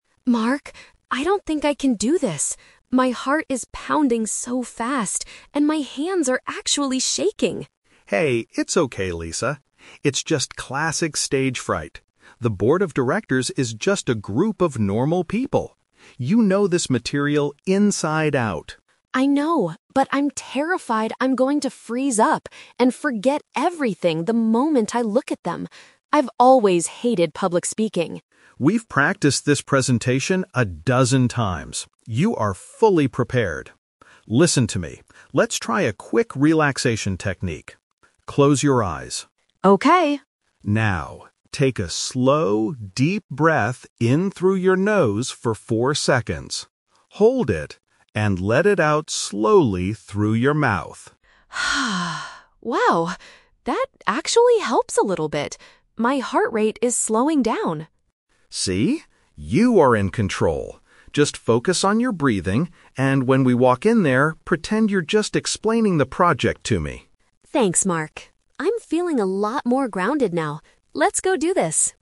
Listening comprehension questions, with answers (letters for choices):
Listen to the conversation between two colleagues. Choose the correct answer (A, B, or C) for each question.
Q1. Why is Lisa feeling terrified before the meeting?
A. She is afraid she will not remember what to say during her speech.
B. She realizes that she didn't prepare the project materials well enough.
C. She is worried because the board of directors asked her a difficult question.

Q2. What is Mark's main suggestion to help Lisa calm down?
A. Drink a glass of water before looking at the board of directors.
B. Cancel the presentation until she stops shaking completely.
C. Perform a specific breathing exercise to reduce her stress.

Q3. How does Lisa feel at the end of the conversation?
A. She still feels that her heart is beating much too fast.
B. She feels much calmer and more in control of her emotions.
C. She feels completely exhausted from practicing the presentation.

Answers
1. A
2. C
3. B

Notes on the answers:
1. The Key: Lisa says she is terrified she will "freeze up and forget everything." Option A is a direct paraphrase of this fear. The Trap (B): Mark explicitly states, "You are fully prepared" and that she knows the material "inside out." She is not lacking preparation; she is just nervous. The Plausible (C): They are going to present to the board of directors, but the meeting hasn't started yet, so nobody has asked her any questions.
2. The Key: Mark tells her to try a "relaxation technique" and guides her to "take a slow, deep breath in... and let it out slowly." This is a breathing exercise. The Trap (B): Lisa mentions her hands are "shaking," but Mark encourages her to do the presentation anyway. He does not suggest canceling it. The Plausible (A): Drinking water is a very common and realistic way to calm down before public speaking, but Mark never mentions it in the audio.
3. The Key: At the end, Lisa says, "I'm feeling a lot more grounded now." The word "grounded" means feeling emotionally stable and calm. Mark also tells her "You are in control." The Trap (A): The audio mentions her heart pounding earlier, but after breathing, Lisa says, "My heart rate is slowing down," meaning it is no longer beating too fast. The Trap (C): Mark mentions they "practiced this presentation a dozen times," but Lisa never says she is exhausted or tired from doing so.

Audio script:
Lisa: Mark, I don't think I can do this. My heart is pounding so fast, and my hands are actually shaking.
Mark: Hey, it's okay, Lisa. It's just classic stage fright. The board of directors is just a group of normal people. You know this material inside out.
Lisa: I know, but I'm terrified I'm going to freeze up and forget everything the moment I look at them. I've always hated public speaking.
Mark: We've practiced this presentation a dozen times. You are fully prepared. Listen to me, let's try a quick relaxation technique. Close your eyes.
Lisa: Okay...
Mark: Now, take a slow, deep breath in through your nose for four seconds... hold it... and let it out slowly through your mouth.
Lisa: Wow, that actually helps a little bit. My heart rate is slowing down.
Mark: See? You are in control. Just focus on your breathing, and when we walk in there, pretend you're just explaining the project to me.